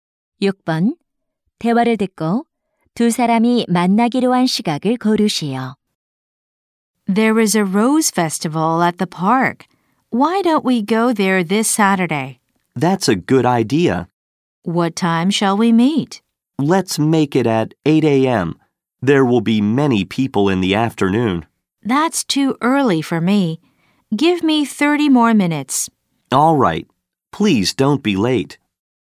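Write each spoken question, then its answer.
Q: 대화를 듣고 두 사람이 만나기로 한 시각을 고르시오.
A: 오전 8시 30분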